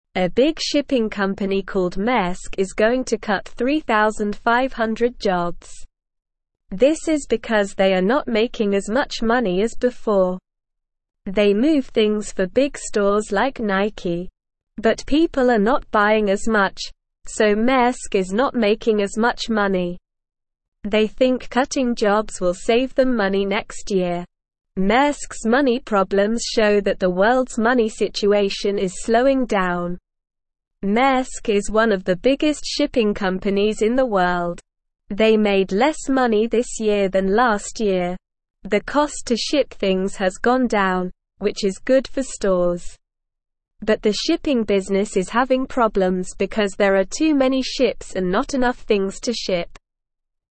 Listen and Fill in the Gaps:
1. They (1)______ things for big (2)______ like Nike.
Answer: move

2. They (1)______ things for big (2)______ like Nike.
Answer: stores

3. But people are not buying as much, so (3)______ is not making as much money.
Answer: Maersk

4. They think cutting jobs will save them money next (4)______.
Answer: year

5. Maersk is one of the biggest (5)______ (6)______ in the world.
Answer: shipping

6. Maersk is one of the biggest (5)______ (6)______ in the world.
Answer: companies

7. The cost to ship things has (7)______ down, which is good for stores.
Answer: gone

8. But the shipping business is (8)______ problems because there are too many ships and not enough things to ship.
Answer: having

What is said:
A big shipping company called Maersk is going to cut 3,500 jobs. This is because they are not making as much money as before. They move things for big stores like Nike. But people are not buying as much, so Maersk is not making as much money. They think cutting jobs will save them money next year.
Maersk's money problems show that the world's money situation is slowing down. Maersk is one of the biggest shipping companies in the world. They made less money this year than last year. The cost to ship things has gone down, which is good for stores. But the shipping business is having problems because there are too many ships and not enough things to ship.

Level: Level 1